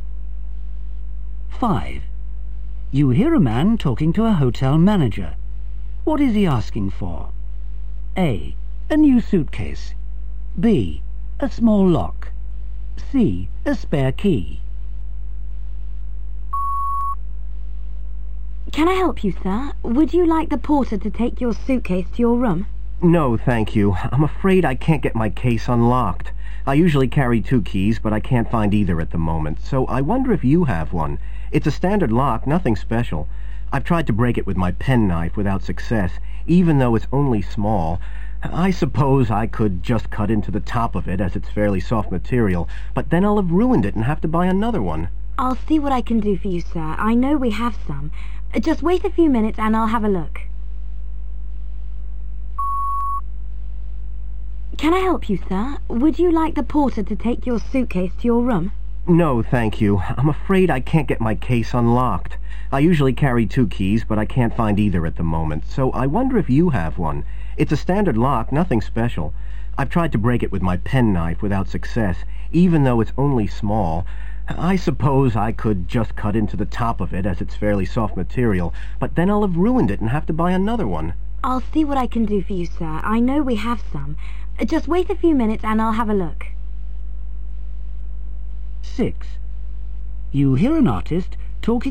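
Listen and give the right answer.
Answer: C: A spare key.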